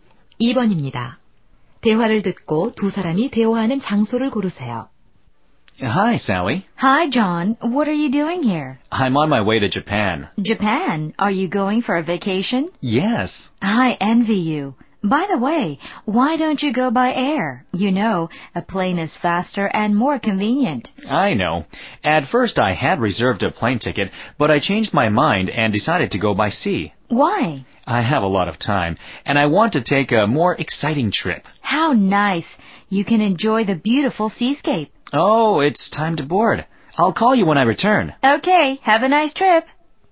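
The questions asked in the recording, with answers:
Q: 대화를 듣고 두 사람이 대화하는 장소를 고르세요.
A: 항구 (여객선 터미널)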